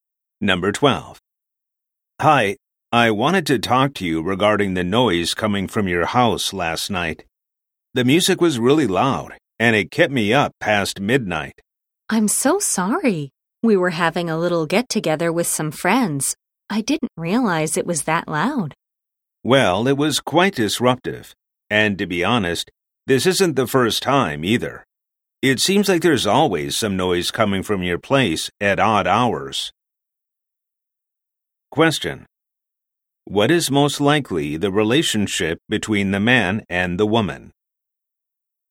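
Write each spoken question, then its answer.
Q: What is most likely the relationship between the man and the woman?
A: Neighbors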